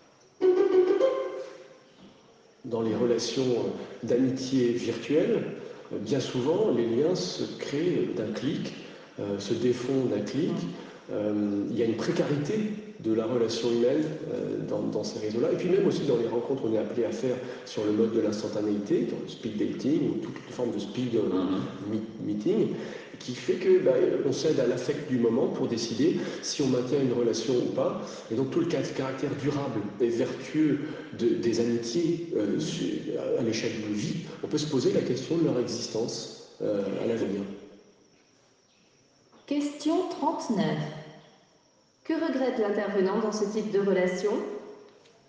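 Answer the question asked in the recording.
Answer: La précarité des liens, qui se créent et se défont d'un clic, au lieu d'amitiés durables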